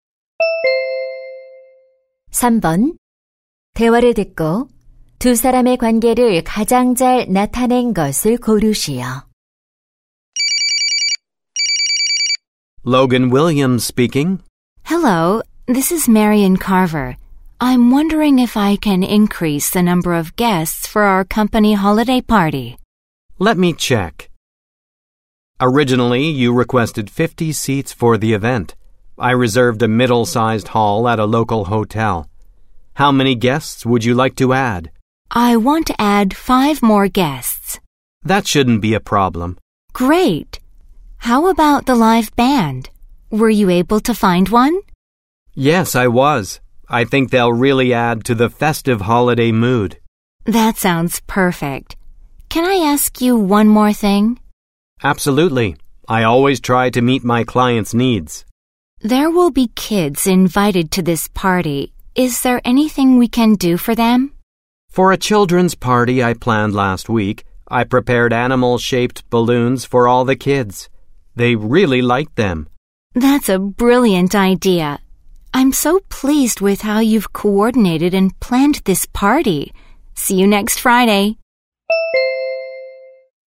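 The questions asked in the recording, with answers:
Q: 대화를 듣고 두 사람의 관계를 가장 잘 나타낸 것을 고르시오.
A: 파티 기획자 - 고객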